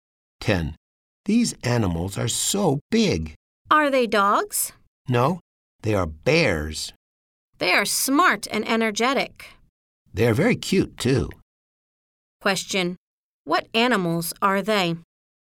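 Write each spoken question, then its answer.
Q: What animals are they?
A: They are bears.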